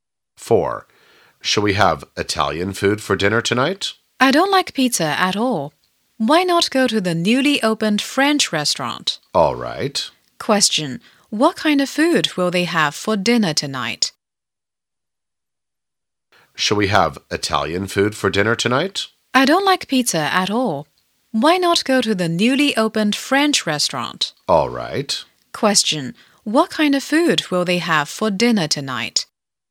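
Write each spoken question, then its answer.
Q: What kind of food will they have for dinner tonight?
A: French food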